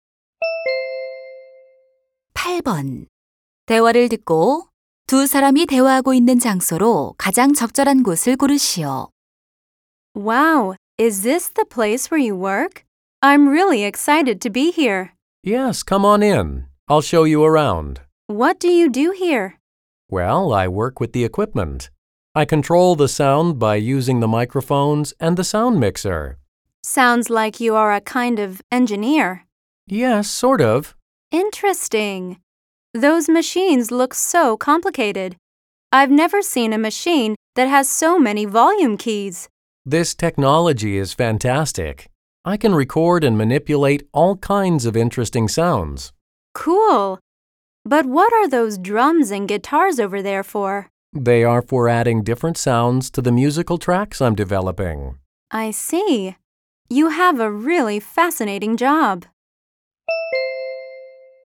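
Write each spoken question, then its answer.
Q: 대화를 듣고 두 사람이 대화하고 있는 장소로 가장 적절한 곳을 고르시오.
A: 녹음실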